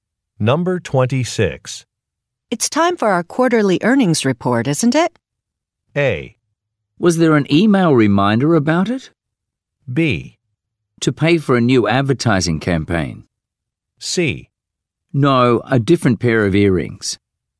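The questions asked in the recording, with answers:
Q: It's time for our quarterly earnings report, isn't it?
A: A: Was there an email reminder about it?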